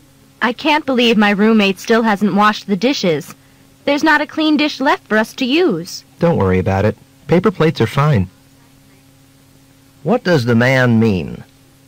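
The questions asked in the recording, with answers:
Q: What does the man mean?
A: They can use paper plates instead.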